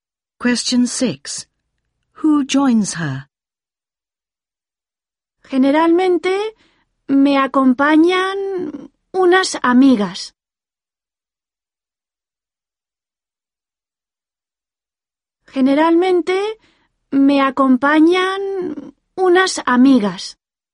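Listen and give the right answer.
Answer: Some (girl)friends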